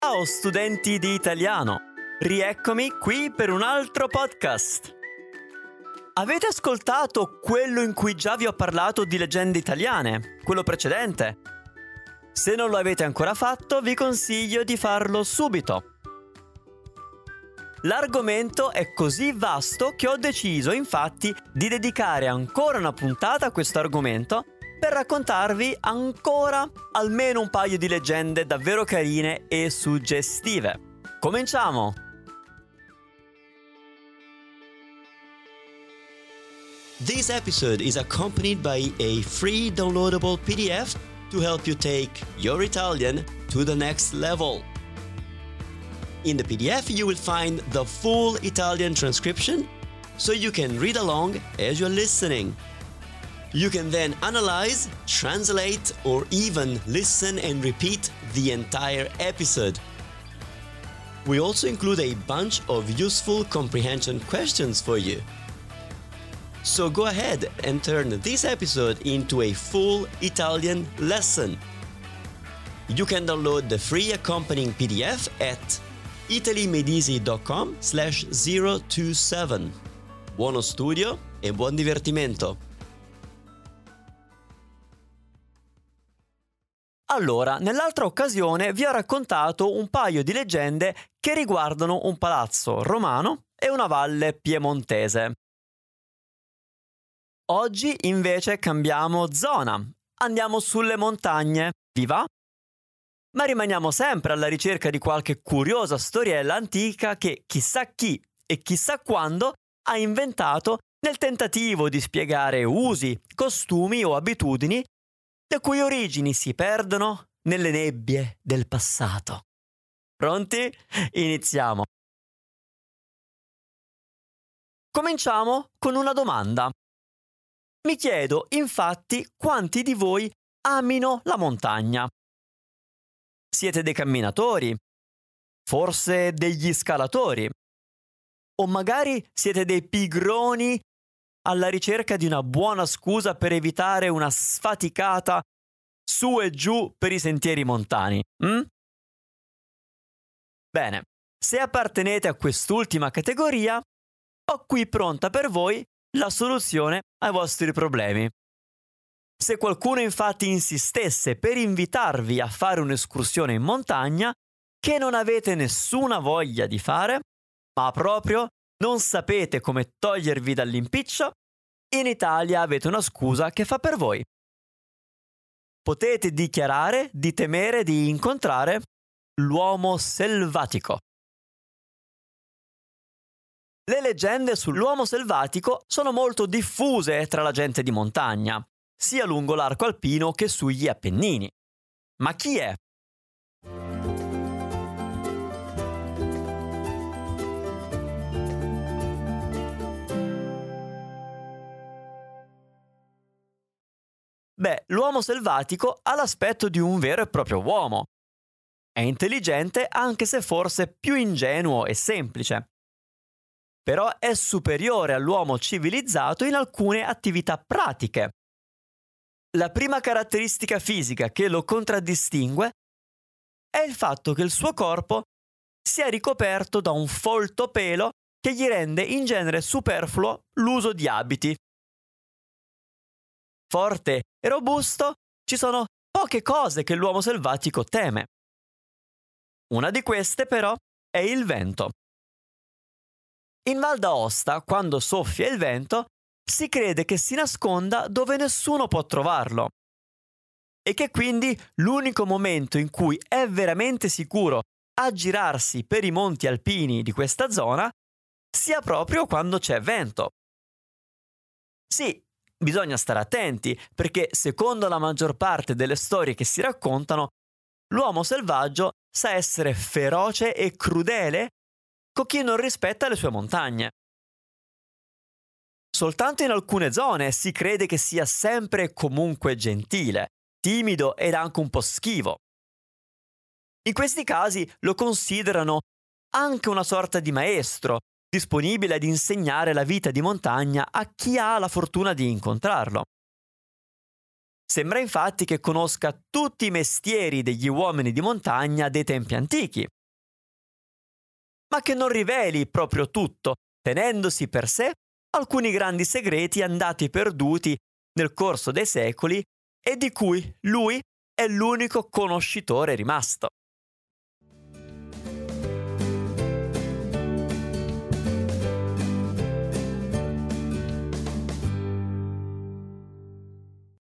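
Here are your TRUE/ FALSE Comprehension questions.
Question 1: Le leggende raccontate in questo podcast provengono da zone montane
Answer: Vero

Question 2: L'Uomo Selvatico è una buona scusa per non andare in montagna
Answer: Vero

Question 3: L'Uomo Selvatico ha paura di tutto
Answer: Falso

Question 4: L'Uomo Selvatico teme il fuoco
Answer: Falso

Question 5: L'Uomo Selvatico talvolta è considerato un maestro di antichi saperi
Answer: Vero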